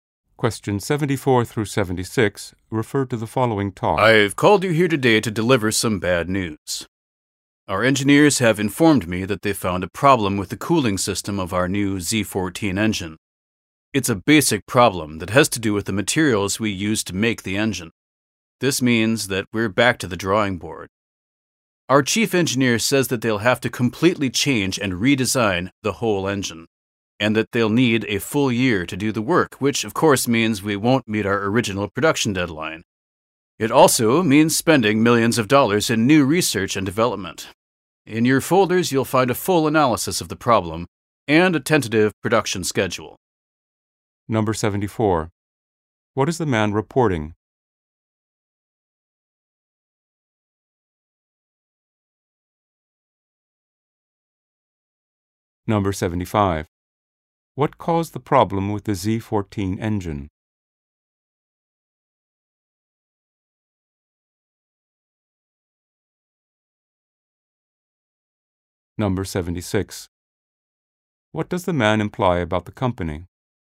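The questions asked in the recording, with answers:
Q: What is the man reporting?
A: A problem with the cooling system of the new Z14 engine

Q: What caused the problem with the Z14 engine?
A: The materials used to make the engine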